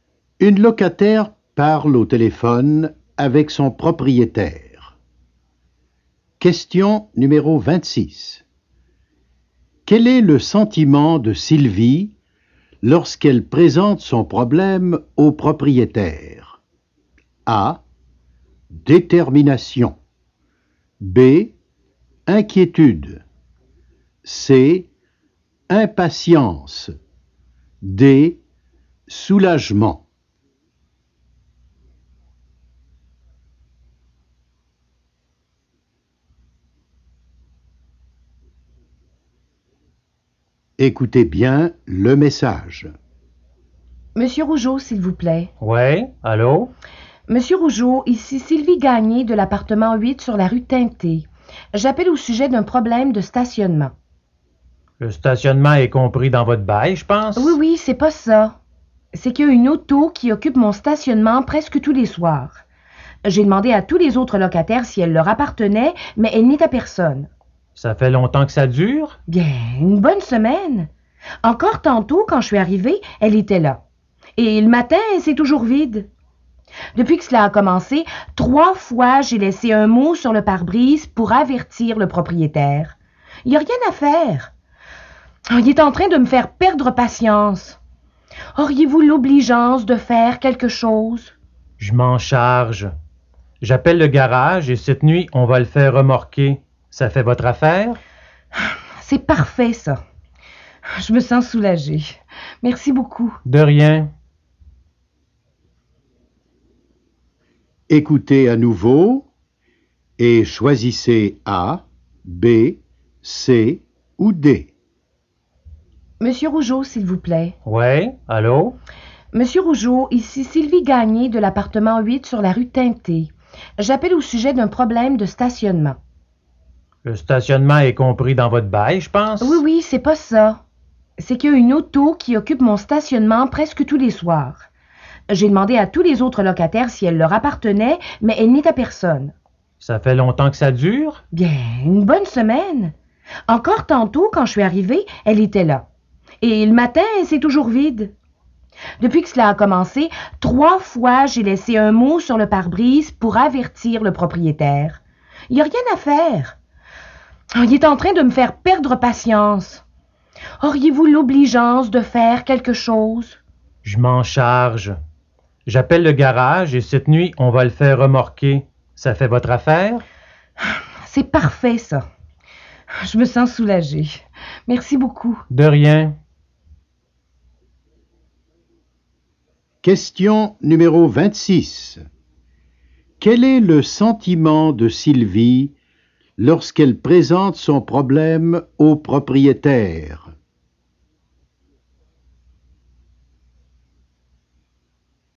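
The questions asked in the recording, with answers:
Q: Quel est le sentiment de Sylvie lorsqu'elle présente son problème au propriétaire?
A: C: Impatience.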